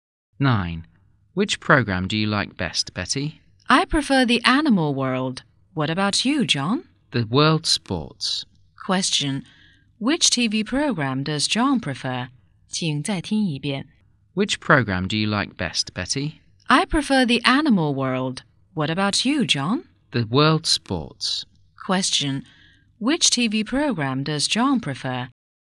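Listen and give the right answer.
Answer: The world sports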